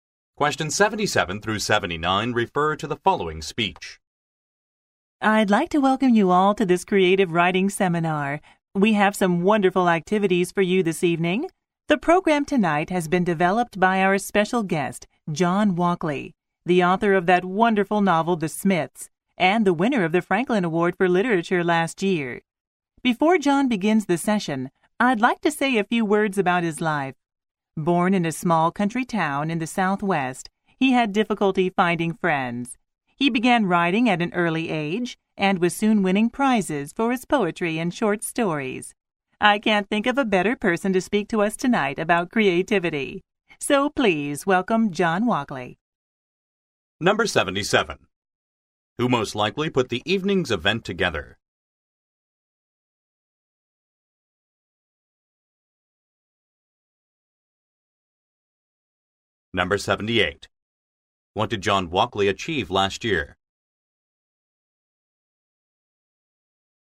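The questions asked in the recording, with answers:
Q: Who most likely put the evening's event together?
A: John Walkley, the special guest

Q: What did John Walkley achieve last year?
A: He won the Franklin Award for Literature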